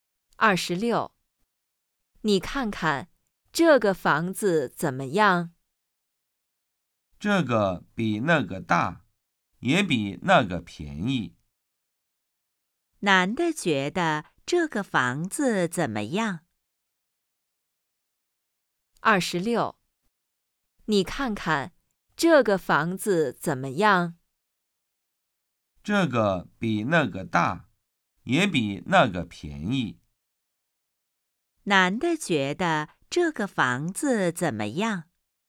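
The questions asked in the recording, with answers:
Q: 男的觉得这个房子怎么样?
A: 比那个大,也比那个便宜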